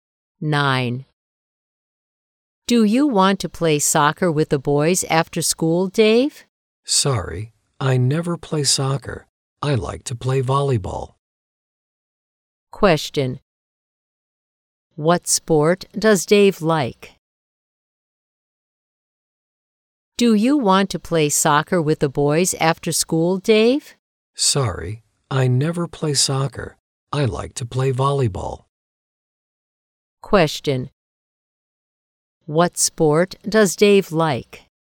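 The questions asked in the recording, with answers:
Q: What sport does Dave like?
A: Volleyball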